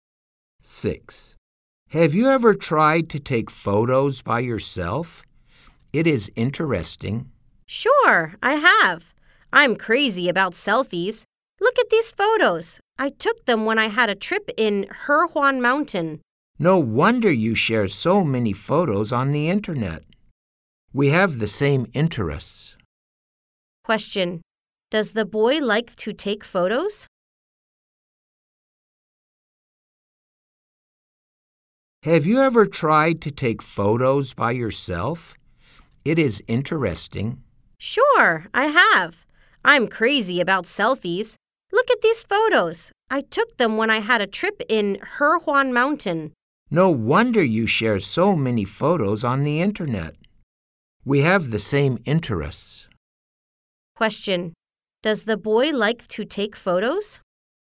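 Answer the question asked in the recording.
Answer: Yes, he does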